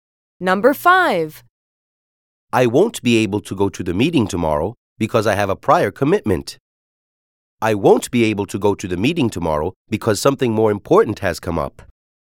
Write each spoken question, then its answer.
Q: I won't be able to go to the meeting tomorrow because I have a prior commitment.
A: Different is the correct answer.